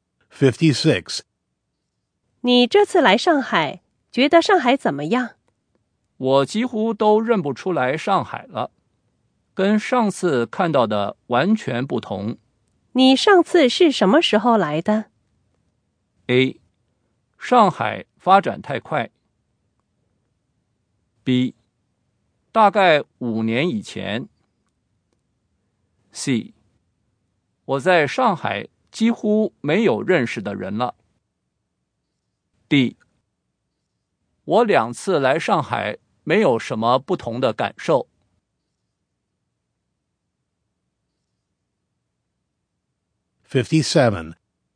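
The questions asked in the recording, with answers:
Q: 你上次是什么时候来的?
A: B: 大概5年以前。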